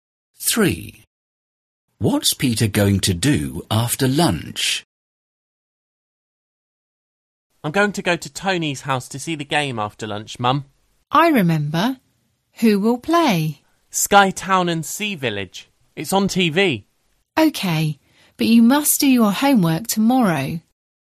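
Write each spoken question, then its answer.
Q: What's Peter going to do after lunch?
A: watch the game on TV at Tony's house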